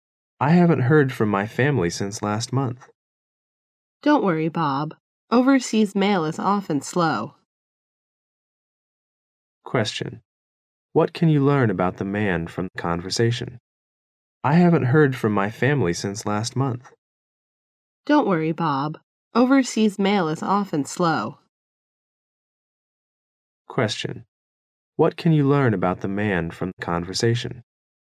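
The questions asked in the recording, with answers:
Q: What can you learn about the man from the conversation?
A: His family lives overseas and he has had no letter from them since last month.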